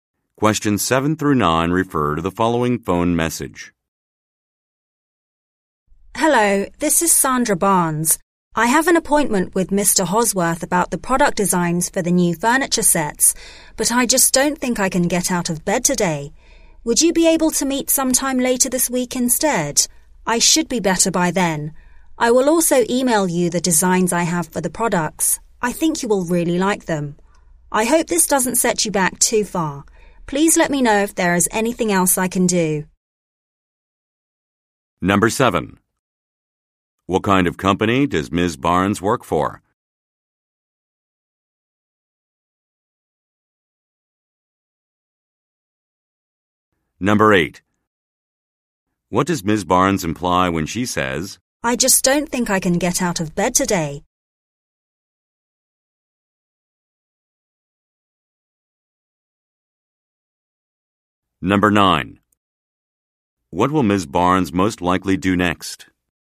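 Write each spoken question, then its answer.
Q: What does Ms. Barnes imply when she says, I just don't think I can get out of bed today?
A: She is sick

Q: What will Ms. Barnes most likely do next?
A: Email the product designs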